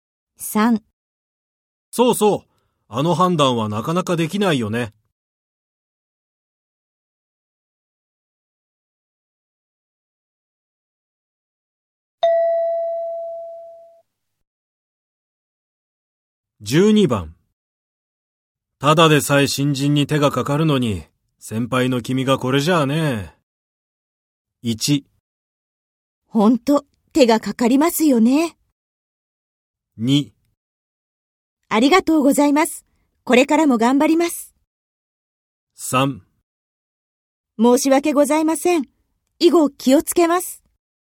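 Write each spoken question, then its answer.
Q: ただでさえ新人に手がかかるのに、先輩の君がこれじゃあね。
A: 3: 申し訳ございません。以後気をつけます。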